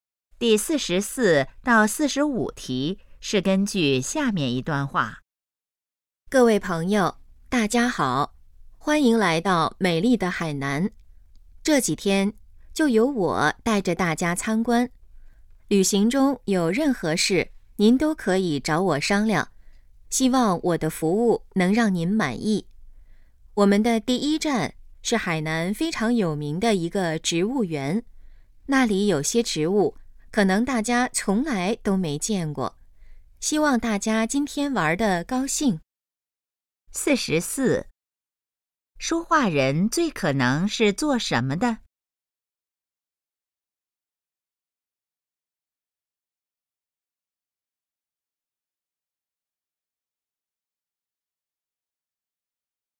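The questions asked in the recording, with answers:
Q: 说话人最可能是做什么的?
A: 导游

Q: 关于那个植物园,下列哪个正确?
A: 很有名,有些植物大家没见过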